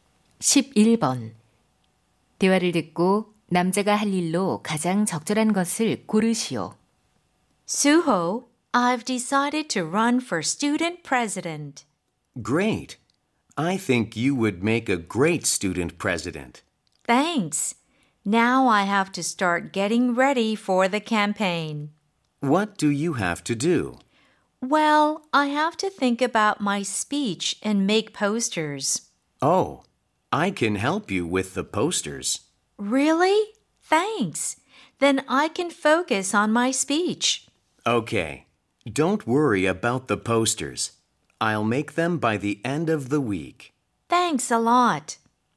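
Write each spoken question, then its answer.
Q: 대화를 듣고 남자가 할 일로 가장 적절한 것을 고르시오.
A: 포스터 만들기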